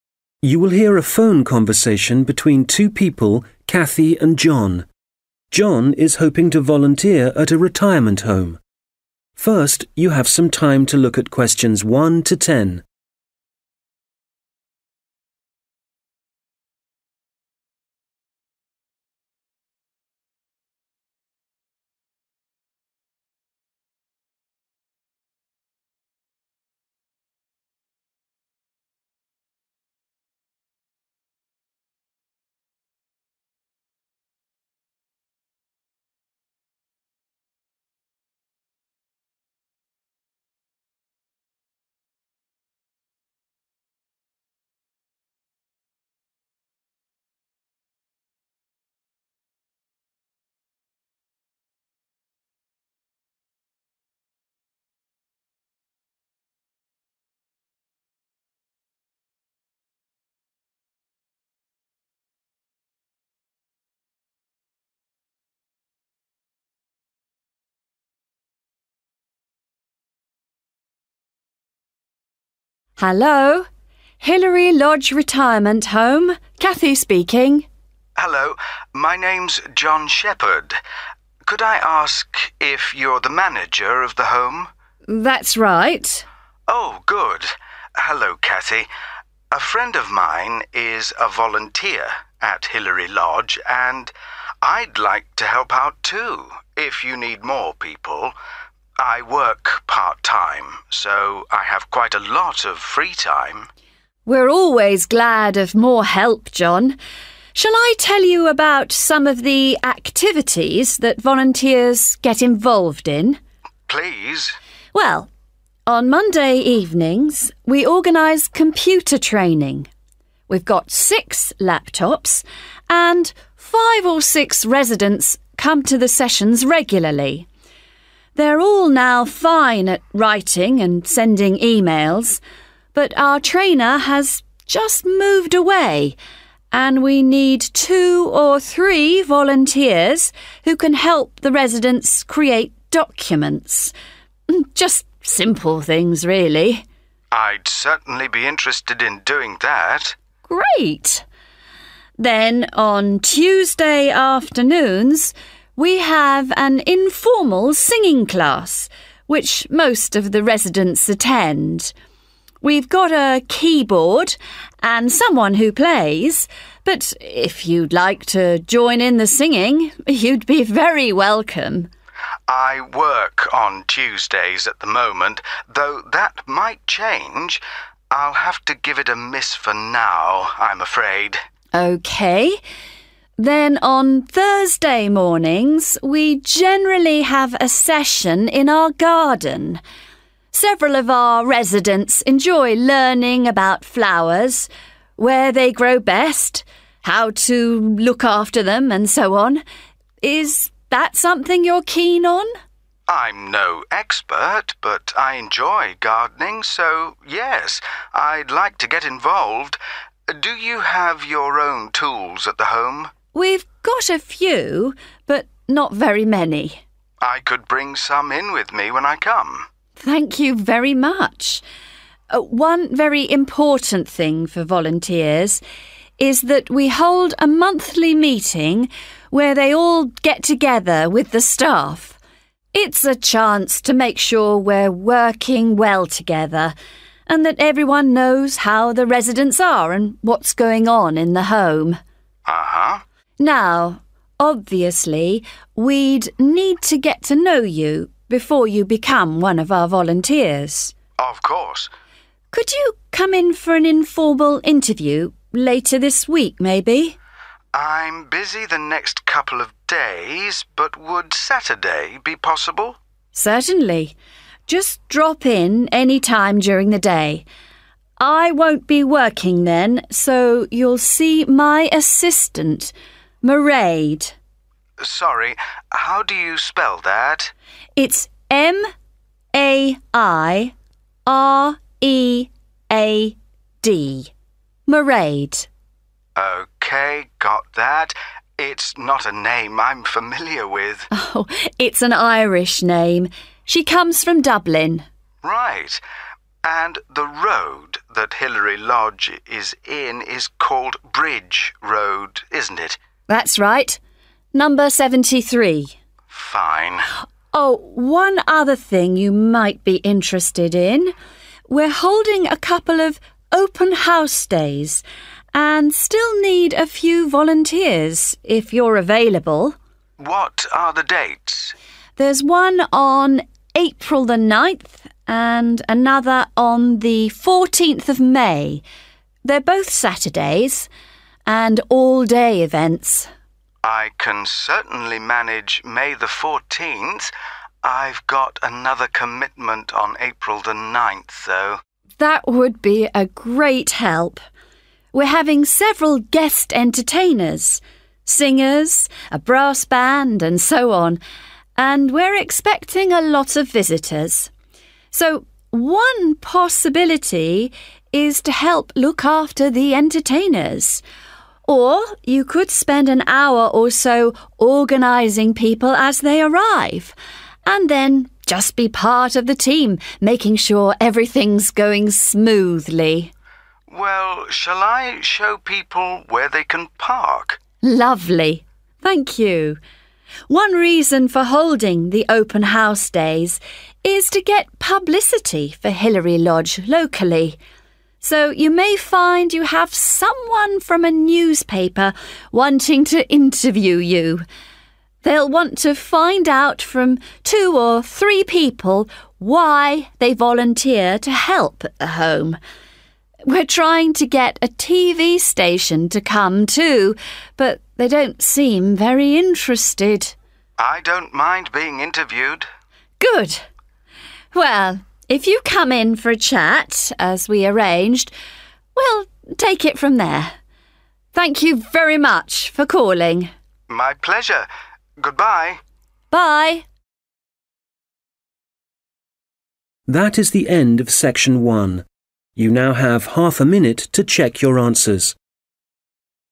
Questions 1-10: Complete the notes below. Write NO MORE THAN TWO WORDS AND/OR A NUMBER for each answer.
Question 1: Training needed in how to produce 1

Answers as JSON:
{"1": "simple documents"}

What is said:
John: Hello, my name's John Shepherd. Could I ask if you're the manager of the home?
Cathy: That's right.
John: Oh, good. A friend of mine is a volunteer at Hillary Lodge, and I'd like to help out, too, if you need more people. I work part-time, so I have quite a lot of free time.
Cathy: We're always glad of more help, John. Shall I tell you about some of the activities that volunteers get involved in?
John: Please.
Cathy: Well, on Monday evenings we organise computer training. We've got six laptops, and five or six residents come to the sessions regularly. They're all now fine at writing and sending emails, but our trainer has just moved away, and (Q1) we need two or three volunteers who can help the residents create documents. Just simple things, really.
(Cho phép đáp án: simple documents)
John: I'd certainly be interested in doing that.
Cathy: Great. Then on Tuesday afternoons, we have an informal singing class, which most of the residents attend. (Q2) We've got a keyboard, and someone who plays [Chúng tôi có đàn phím và người chơi rồi], but if you'd like to join in the singing, you'd be very welcome.
John: I work on Tuesdays at the moment, though that might change. I'll have to give it a miss for now, I'm afraid.
Cathy: OK. Then on Thursday mornings we generally have a session in our garden. (Q3) Several of our residents enjoy learning about flowers, where they grow best, how to look after them, and so on.
John: I'm no expert, but I enjoy gardening, so yes, I'd like to get involved. (Q4) Do you have your own tools at the home?
Cathy: We've got a few, but not very many.
John: I could bring some in with me when I come.
Cathy: Thank you very much. One very important thing for volunteers is that we hold a monthly meeting where they all get together with the staff. It's a chance to make sure we're working well together, and that everyone knows how the residents are, and what's going on in the home.
Cathy: Now obviously we'd need to get to know you before you become one of our volunteers.
John: Of course.
Cathy: Could you come in for an informal interview – later this week, maybe?
John: (Q5) I'm busy the next couple of days, but would Saturday be possible?
Cathy: Certainly. Just drop in any time during the day.
John: Sorry, how do you spell that?
Cathy: It's M-A-I-R-E-A-D, Mairead. [Là M-A-I-R-E-A-D, Mairead]
John: OK, got that. It's not a name I'm familiar with.
Cathy: It's an Irish name. She comes from Dublin.
John: Right. (Q7) And the road that Hilary Lodge is in is called Bridge Road, isn't it?
Cathy: That's right. Number 73. [Đúng rồi. Số 73]
John: Fine.
Cathy: Oh, one other thing you might be interested in – we're holding a couple of 'open house' days, and still need a few volunteers (= help), if you're available.
John: What are the dates?
Cathy: There's one on April 9th, and another on 14th May. They're both Saturdays, and all-day events.
John: (Q8) I can certainly manage May 14th.
Cathy: That would be a great help. We're having several guest entertainers – singers, a brass band, and so on- and we're expecting a lot of visitors. So one possibility is to help look after the entertainers, or you could spend an hour or so organising people as they arrive, and then just be part of the team making sure everything's going smoothly.
John: (Q9) Well, shall I show people where they can park?
Cathy: Lovely. Thank you. One reason for holding the open house days is to get publicity for Hillary Lodge locally. (Q10) So you may find you have someone from a newspaper wanting to interview you. We're trying to get a TV station to come, too, but they don't seem very interested.
John: I don't mind being interviewed.
Cathy: Good. Well, if you come in for a chat, as we arranged, we'll take it from there.